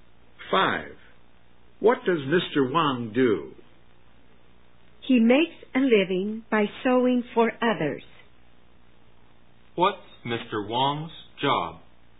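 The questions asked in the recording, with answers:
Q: What's Mr. Wang's job?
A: A tailor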